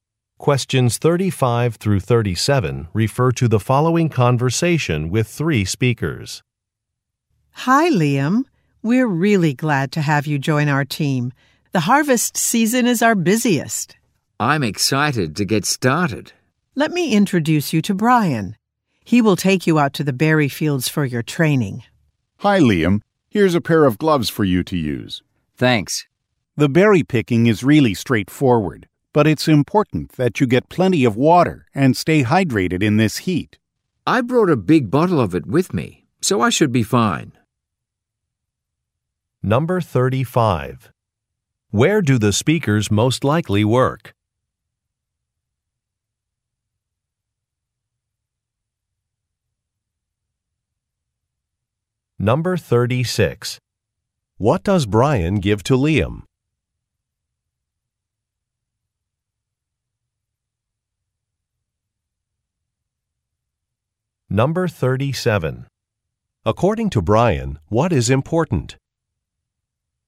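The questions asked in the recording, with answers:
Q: Where do the speakers most likely work?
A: On a farm (berry farm)

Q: What does Brian give to Liam?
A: A pair of gloves

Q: According to Brian, what is important?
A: Drinking plenty of water and staying hydrated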